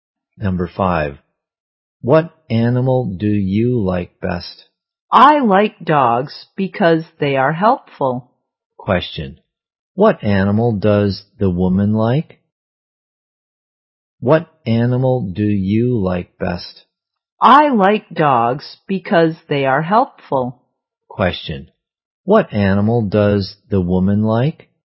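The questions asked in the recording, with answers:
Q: Question, what animal does the woman like?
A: Dogs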